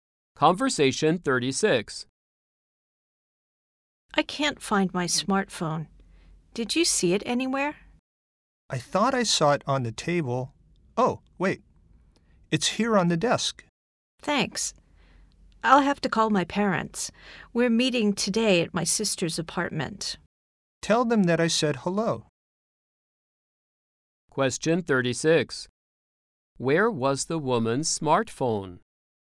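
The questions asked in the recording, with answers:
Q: Where was the woman's smartphone?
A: On the desk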